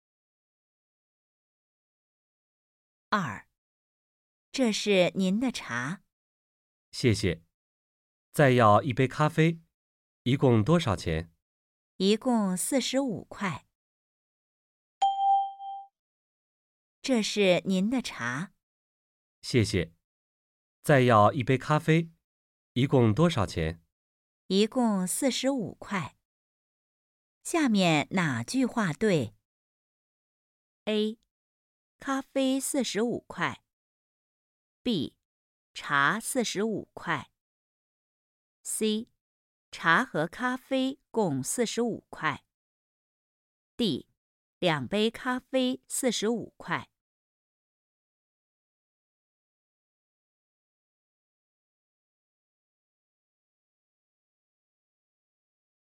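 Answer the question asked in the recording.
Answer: C: 茶和咖啡共45块。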